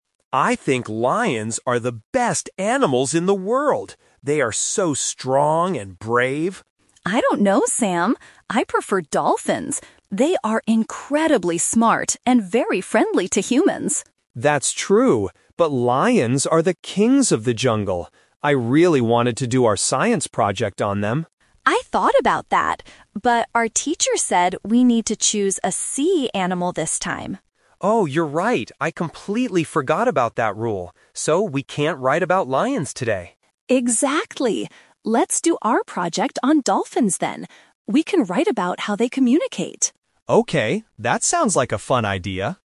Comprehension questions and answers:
Listen to the conversation between two students and choose the correct answer (A, B, or C).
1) What animal did Sam want to write about at first?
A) A dolphin.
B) A lion.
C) A tiger.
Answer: A lion.

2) Why can't they do their project on Sam's favorite animal?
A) Because Emma hates lions.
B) Because lions are not smart enough.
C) Because they have to choose a sea animal.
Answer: Because they have to choose a sea animal.

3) What is their final decision for the science project?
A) They will write about dolphins.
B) They will write about lions.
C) They will ask the teacher for a different topic.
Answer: They will write about dolphins.

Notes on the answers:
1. Sam explicitly says, "I really wanted to do our science project on them" (referring to lions). Option (A) is the trap; a dolphin is Emma's favorite animal, not what Sam wanted at first. Option (C) is not mentioned.
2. Emma reminds Sam that "our teacher said we need to choose a sea animal this time." Option (A) is the trap; Emma prefers dolphins, but the real reason they can't choose lions is the teacher's rule.
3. After realizing they must choose a sea animal, Emma suggests, "Let's do our project on dolphins then," and Sam agrees by saying, "Okay." Option (B) is the trap because it was Sam's original plan before he remembered the rule (The Twist).

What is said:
Sam: I think lions are the best animals in the world. They are so strong and brave!
Emma: I don't know, Sam. I prefer dolphins. They are incredibly smart and very friendly to humans.
Sam: That's true, but lions are the kings of the jungle. I really wanted to do our science project on them.
Emma: I thought about that, but our teacher said we need to choose a sea animal this time.
Sam: Oh, you're right! I completely forgot about that rule. So, we can't write about lions today.
Emma: Exactly. Let's do our project on dolphins then.

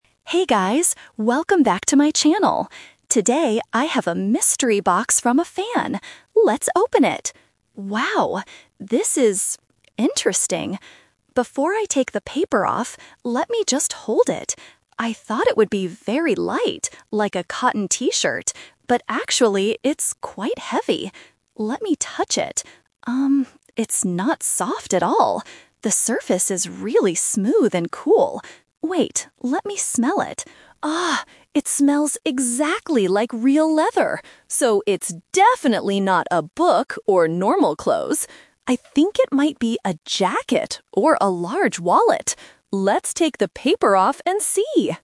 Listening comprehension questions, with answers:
Listen to the unboxing video and choose the correct answer (A, B, or C).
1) How does the mystery item feel?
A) It is very light and soft.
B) It is quite heavy and smooth.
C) It is very hard and warm.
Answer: It is quite heavy and smooth.

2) What does the item smell like?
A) Old paper.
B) New clothes.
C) Real leather.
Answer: Real leather.

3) What does the YouTuber think the item is at the end?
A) A cotton T-shirt.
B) A jacket or a wallet.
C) A heavy book.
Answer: A jacket or a wallet.

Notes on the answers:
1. The YouTuber clearly describes the item: "actually, it's quite heavy" and "The surface is really smooth..." The Trap: Option (A) is the "Twist". The YouTuber thought it would be light and soft like a T-shirt, but then says "actually, it's quite heavy" and "it's not soft at all". Option (C) is a plausible description for an object but is not mentioned.
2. The YouTuber smells the item and says, "It smells exactly like real leather." The Trap: Option (A) is a trap because the word "paper" is mentioned (the wrapping paper), but it is not the smell. Option (B) is a trap because "clothes" are mentioned later, but she explicitly says it is "definitely not... normal clothes."
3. At the end of the video, she guesses: "I think it might be a jacket or a large wallet." The Trap: Option (A) is a trap because a T-shirt is what she thought it was before she felt it. Option (C) is a trap because she explicitly rejects it by saying, "it's definitely not a book."

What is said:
normal clothes."
YouTuber: Hey guys, welcome back to my channel! Today, I have a mystery box from a fan. Let's open it! Wow, this is... interesting. Before I take the paper off, let me just hold it. I thought it would be very light, like a cotton T-shirt, but actually, it's quite heavy. Let me touch it... um, it's not soft at all. The surface is really smooth and cool. Wait, let me smell it. Ah! It smells exactly like real leather. So, it's definitely not a book or normal clothes. I think it might be a jacket or a large wallet. Let's take the paper off and see!

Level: A2

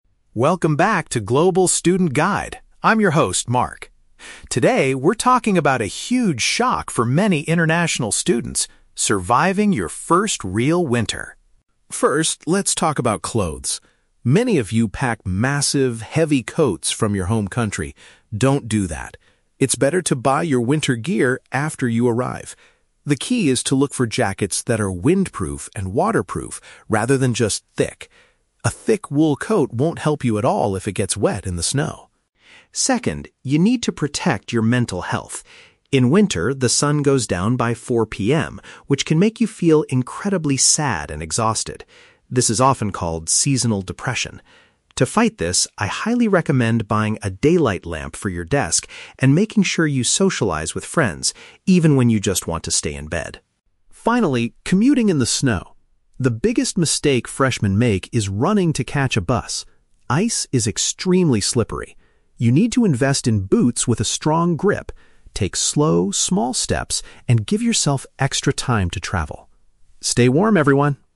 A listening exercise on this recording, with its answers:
Listen to a podcast episode hosted by a former international student. Read the questions below and choose the correct answer (A, B, or C) for each.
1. What does the host advise students to do regarding winter clothing?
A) Purchase thick wool coats before leaving their home country.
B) Wait until they reach their destination to get suitable jackets.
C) Wear several layers of thin shirts instead of one heavy sweater.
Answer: Wait until they reach their destination to get suitable jackets.

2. How can students combat the sadness caused by the lack of sunlight?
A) By purchasing a special lamp and spending time with other people.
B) By taking a long nap in bed whenever they feel extremely exhausted.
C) By consuming extra vitamins and exercising outdoors every afternoon.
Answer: By purchasing a special lamp and spending time with other people.

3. What is the most common error new students make when it snows?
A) Wearing winter boots that are completely flat on the bottom.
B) Forgetting to check the local bus timetable before leaving the house.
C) Moving too quickly when trying to catch public transportation.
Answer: Moving too quickly when trying to catch public transportation.

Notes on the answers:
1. The Key (Correct): The host advises, "It's better to buy your winter gear after you arrive." (Paraphrased: after you arrive = until they reach their destination; winter gear = suitable jackets). The Trap: Option (A) is the exact opposite of the advice. He mentions "thick wool coats" but says they "won't help you at all if it gets wet," and tells students NOT to pack them from their home country. Not mentioned: Option (C) is a common piece of winter advice (layering), but the host does not mention it in this podcast.
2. The Key (Correct): The host recommends "buying a daylight lamp" and making sure you "socialize with friends." (Paraphrased: daylight lamp = special lamp; socialize with friends = spending time with other people). The Trap: Option (B) is incorrect because the host says you should socialize "even when you just want to stay in bed." Staying in bed is the feeling you should fight, not the solution. Not mentioned: Option (C) is plausible for fighting depression, but vitamins and outdoor exercise are not mentioned.
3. The Key (Correct): The host states, "The biggest mistake freshmen make is running to catch a bus." (Paraphrased: running = moving too quickly; a bus = public transportation). The Trap: Option (A) is incorrect. The host mentions that you need boots with a "strong grip", meaning flat shoes are bad, but the "biggest mistake" he specifically identifies is running. Not mentioned: Option (B) is completely fabricated. Timetables are not mentioned.

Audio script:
Mark (Host): Welcome back to 'Global Student Guide'. I'm your host, Mark. Today, we're talking about a huge shock for many international students: surviving your first real winter.
First, let's talk about clothes. Many of you pack massive, heavy coats from your home country. Don't do that. It's better to buy your winter gear after you arrive. The key is to look for jackets that are windproof and waterproof, rather than just thick. A thick wool coat won't help you at all if it gets wet in the snow!
Second, you need to protect your mental health. In winter, the sun goes down by 4 PM, which can make you feel incredibly sad and exhausted. This is often called seasonal depression. To fight this, I highly recommend buying a daylight lamp for your desk and making sure you socialize with friends, even when you just want to stay in bed.
Finally, commuting in the snow. The biggest mistake freshmen make is running to catch a bus. Ice is extremely slippery. You need to invest in boots with a strong grip, take slow, small steps, and give yourself extra time to travel. Stay warm, everyone!

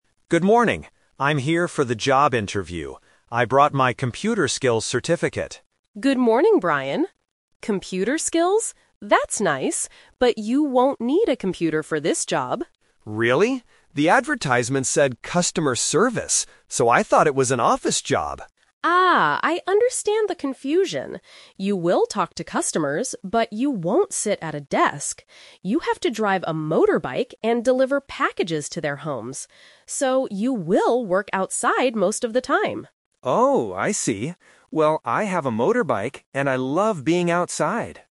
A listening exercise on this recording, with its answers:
Listen to the job interview. Circle the correct answer (A, B, or C).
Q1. What did Brian bring to the interview?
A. A package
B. A motorbike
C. A computer skills certificate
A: A computer skills certificate

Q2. What kind of job did Brian think it was?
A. An office job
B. A delivery job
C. A computer repair job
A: An office job

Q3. What will the worker actually do in this job?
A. Sit at a desk all day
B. Deliver packages on a motorbike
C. Teach computer skills to customers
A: Deliver packages on a motorbike

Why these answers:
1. Brian says at the beginning, "I brought my computer skills certificate." Option (A) is a trap because "packages" are mentioned later as part of the job. Option (B) is a trap: he says he has a motorbike at the end, but he didn't bring it to show the recruiter.
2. Brian explains his confusion: "So, I thought it was an office job." Option (B) is the trap because a delivery job is what the work actually is, not what he thought it was. Option (C) is a plausible guess based on "computer skills," but it is not mentioned.
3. Ms. Clark explains the real job: "You have to drive a motorbike and deliver packages to their homes." Option (A) is the trap because she explicitly says, "...but you won't sit at a desk." Option (C) is incorrect.

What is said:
Brian: Good morning. I'm here for the job interview. I brought my computer skills certificate.
Clark: Good morning, Brian. Computer skills? That's nice, but you won't need a computer for this job.
Brian: Really? The advertisement said "Customer Service." So, I thought it was an office job.
Clark: Ah, I understand the confusion. You will talk to customers, but you won't sit at a desk. You have to drive a motorbike and deliver packages to their homes. So, you will work outside most of the time.

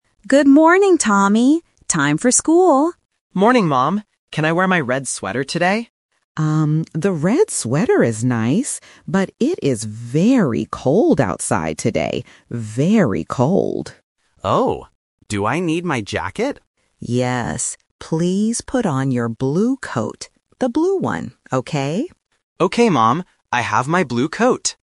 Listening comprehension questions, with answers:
Listen to the conversation between a mother and her son. Choose the correct answer (A, B, or C) for each question.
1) How is the weather outside today?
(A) It is raining.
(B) It is cold.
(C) It is hot.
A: It is cold.

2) What did the boy want to wear at first?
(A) A red sweater.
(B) A blue coat.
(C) A yellow jacket.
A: A red sweater.

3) What does the mother tell the boy to wear?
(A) A red sweater.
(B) A blue coat.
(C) A green shirt.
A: A blue coat.

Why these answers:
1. The mother clearly repeats the weather condition to emphasize it. She says, "it is very cold outside today. Very cold." Option A is not mentioned, and Option C is the opposite of the truth.
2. At the beginning of the conversation, Tommy asks, "Can I wear my red sweater today?" The blue coat (Option B) is the trap here because it is mentioned later as the final choice. Option C is not mentioned.
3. The mother rejects the red sweater (Option A - The Trap) because of the weather. She explicitly instructs him: "Please put on your blue coat." The color blue is also repeated to help A1 learners catch the keyword. Option C is not mentioned.

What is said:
Mom: Good morning, Tommy! Time for school.
Tommy: Morning, Mom! Can I wear my red sweater today?
Mom: Um, the red sweater is nice, but it is very cold outside today. Very cold.
Tommy: Oh. Do I need my jacket?
Mom: Yes. Please put on your blue coat. The blue one, okay?
Tommy: Okay, Mom. I have my blue coat.

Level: A1

